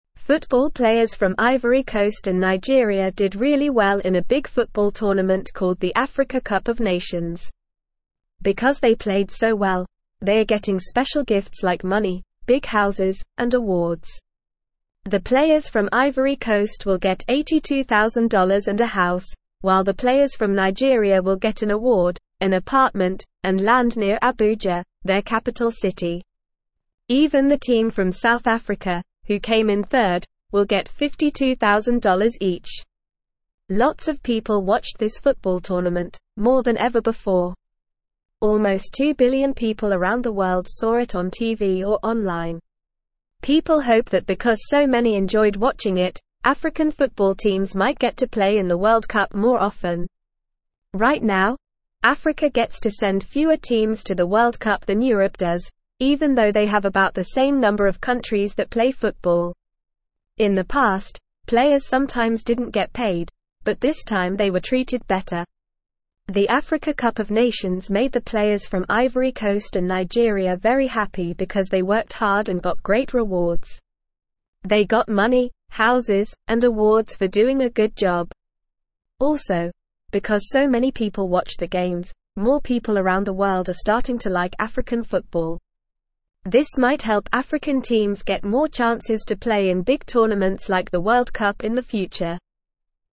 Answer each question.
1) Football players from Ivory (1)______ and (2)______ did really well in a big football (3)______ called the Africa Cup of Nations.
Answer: Coast

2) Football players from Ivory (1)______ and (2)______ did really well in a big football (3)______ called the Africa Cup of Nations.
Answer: Nigeria

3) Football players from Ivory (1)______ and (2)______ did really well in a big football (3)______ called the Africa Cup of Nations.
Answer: tournament

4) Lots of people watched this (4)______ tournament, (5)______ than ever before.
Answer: football

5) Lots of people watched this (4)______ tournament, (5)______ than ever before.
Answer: more

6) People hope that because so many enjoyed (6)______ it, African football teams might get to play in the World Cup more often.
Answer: watching

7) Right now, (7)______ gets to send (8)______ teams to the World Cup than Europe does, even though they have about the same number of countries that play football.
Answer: Africa

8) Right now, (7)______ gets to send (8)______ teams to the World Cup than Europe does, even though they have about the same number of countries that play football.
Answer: fewer

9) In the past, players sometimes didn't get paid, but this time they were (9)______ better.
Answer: treated

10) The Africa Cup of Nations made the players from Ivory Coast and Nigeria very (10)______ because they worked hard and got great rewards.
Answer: happy

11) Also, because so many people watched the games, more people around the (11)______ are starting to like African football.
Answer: world

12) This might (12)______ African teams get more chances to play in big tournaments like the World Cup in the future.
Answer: help

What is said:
Football players from Ivory Coast and Nigeria did really well in a big football tournament called the Africa Cup of Nations. Because they played so well, they are getting special gifts like money, big houses, and awards. The players from Ivory Coast will get $82,000 and a house, while the players from Nigeria will get an award, an apartment, and land near Abuja, their capital city. Even the team from South Africa, who came in third, will get $52,000 each.
Lots of people watched this football tournament, more than ever before. Almost two billion people around the world saw it on TV or online. People hope that because so many enjoyed watching it, African football teams might get to play in the World Cup more often. Right now, Africa gets to send fewer teams to the World Cup than Europe does, even though they have about the same number of countries that play football. In the past, players sometimes didn't get paid, but this time they were treated better.
The Africa Cup of Nations made the players from Ivory Coast and Nigeria very happy because they worked hard and got great rewards. They got money, houses, and awards for doing a good job. Also, because so many people watched the games, more people around the world are starting to like African football. This might help African teams get more chances to play in big tournaments like the World Cup in the future.

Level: Level 2